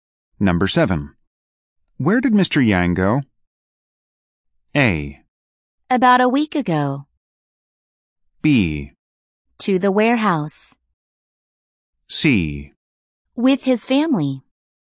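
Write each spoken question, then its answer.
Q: Where did Mr. Yang go?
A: B: To the warehouse.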